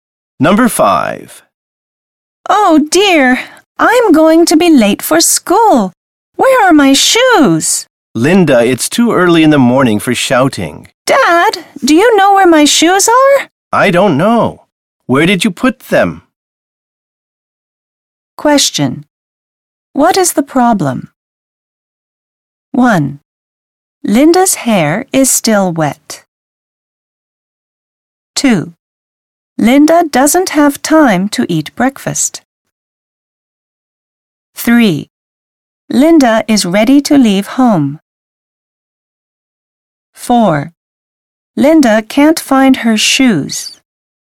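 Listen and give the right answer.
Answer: 4: Linda can't find her shoes.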